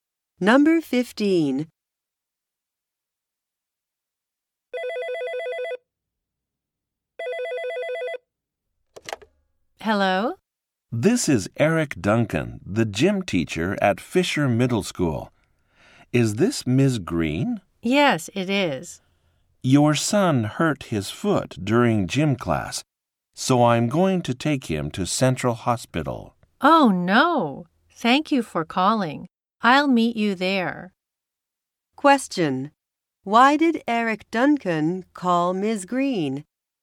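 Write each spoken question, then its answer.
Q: Why did Eric Duncan call Ms.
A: Her son hurt his foot in gym class and is being taken to the hospital.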